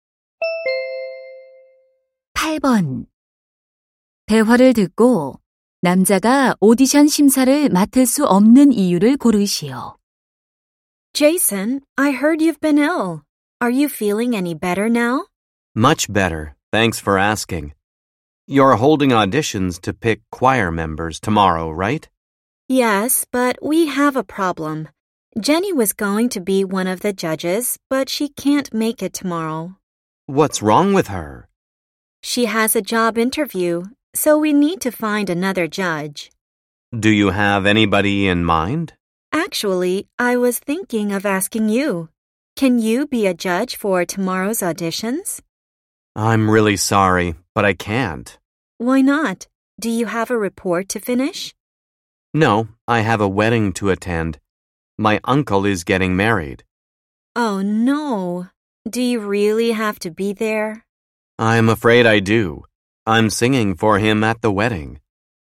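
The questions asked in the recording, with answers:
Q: 대화를 듣고 남자가 오디션 심사를 맡을 수 없는 이유를 고르시오.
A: 삼촌의 결혼식에 참석해야 해서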